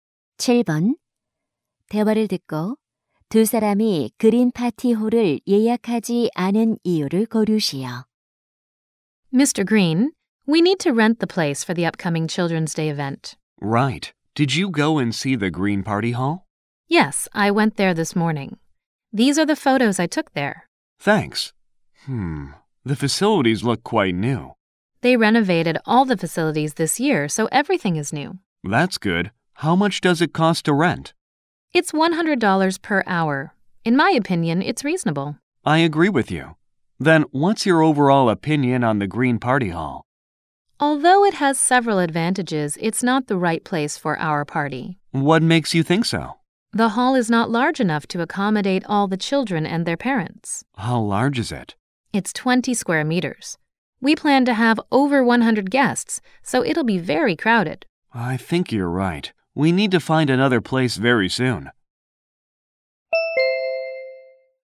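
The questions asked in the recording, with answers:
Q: 대화를 듣고 두 사람이 그린 파티 홀을 예약하지 않은 이유를 고르시오.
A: 모든 손님을 수용하기에 공간이 좁아서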